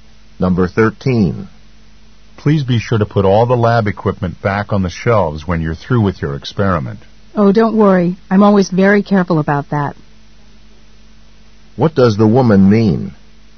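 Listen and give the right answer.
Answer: She always puts the equipment back.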